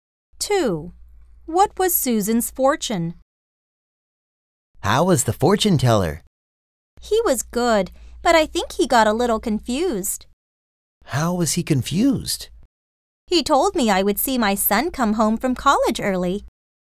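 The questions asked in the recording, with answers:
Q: What was Susan's fortune?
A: She would see her son come home from college early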